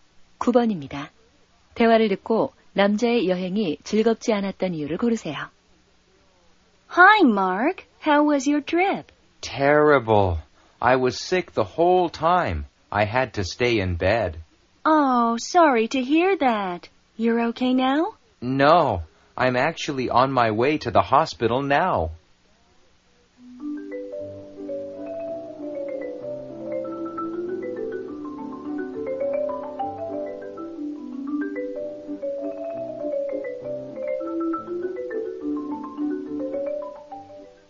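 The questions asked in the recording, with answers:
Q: 대화를 듣고 남자의 여행이 즐겁지 않았던 이유를 고르세요.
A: 여행 내내 아팠기 때문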